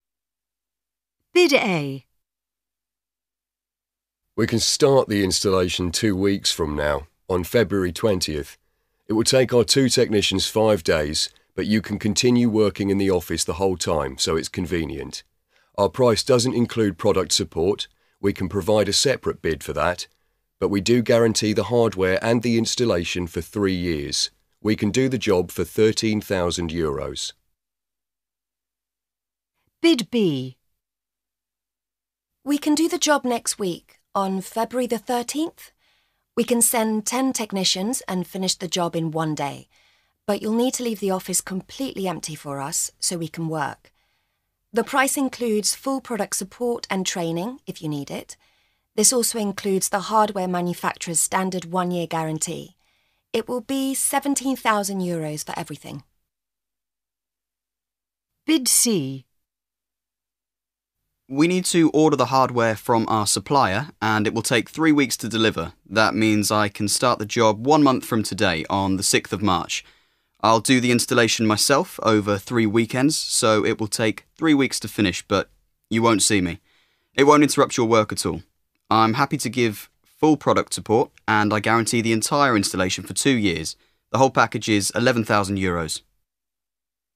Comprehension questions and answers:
A. Listen to three bids to provide a new computer network for a shipping company. Answer the questions.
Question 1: Which supplier can start the soonest?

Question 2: Which supplier is the cheapest?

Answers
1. Bid B
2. Bid C

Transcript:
Bid A
We can start the installation two weeks from now, on February twentieth. It will take our two technicians five days, but you can continue working in the office the whole time, so it's convenient. Our price doesn't include product support – we can provide a separate bid for that. But we do guarantee the hardware and the installation for three years. We can do the job for 13,000 euros.
Bid B
We can do the job next week, on February the thirteenth. We can send ten technicians and finish the job in one day, but you'll need to leave the office completely empty for us, so we can work. The price includes full product support and training, if you need it. This also includes the hardware manufacturer's standard one-year guarantee. It will be 17,000 euros for everything.
Bid C
We need to order the hardware from our supplier, and it will take three weeks to deliver. That means I can start the job one month from today – on the sixth of March. I'll do the installation myself, over three weekends – so it will take three weeks to finish, but you won't see me. It won't interrupt your work at all. I'm happy to give full product support, and I guarantee the entire installation for two years. The whole package is 11,000 euros.